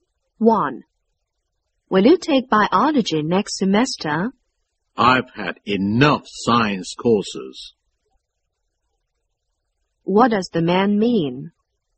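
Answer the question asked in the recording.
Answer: He won't take biology; he's had enough science courses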